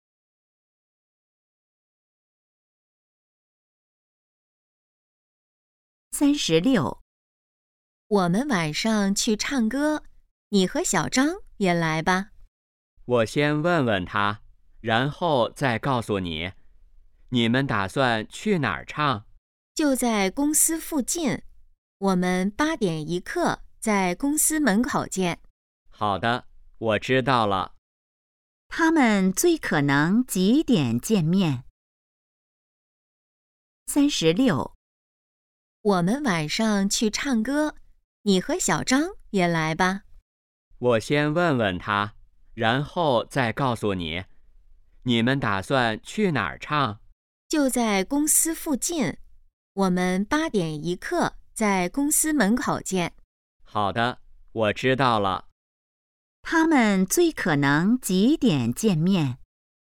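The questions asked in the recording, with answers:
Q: 他们最可能几点见面?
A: 8点15分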